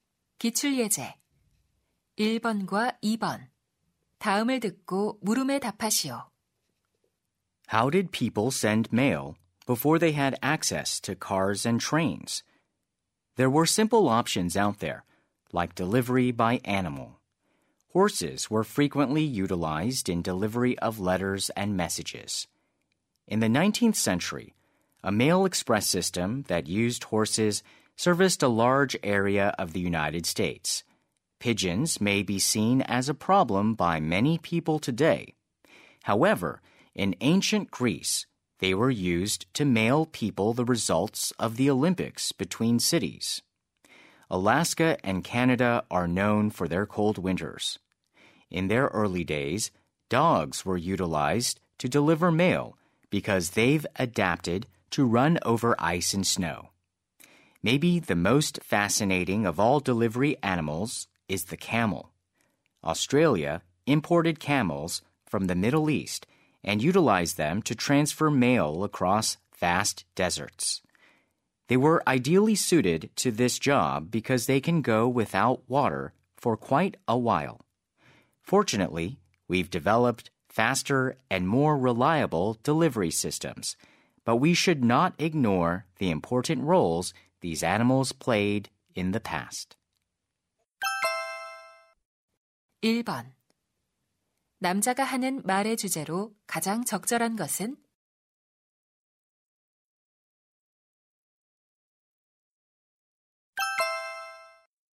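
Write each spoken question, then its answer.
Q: 남자가 하는 말의 주제로 가장 적절한 것은?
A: 과거에 우편 배달에 이용된 동물들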